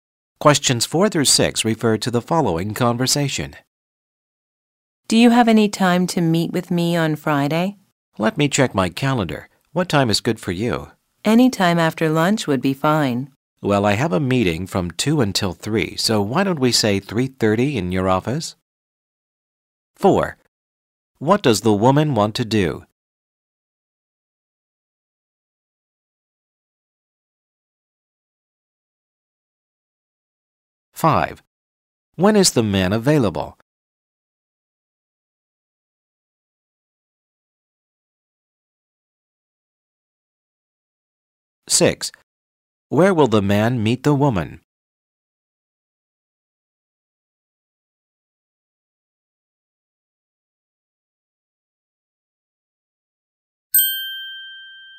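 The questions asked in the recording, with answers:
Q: What does the woman want to do?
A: Meet with the man on Friday

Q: When is the man available?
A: At 3:30 on Friday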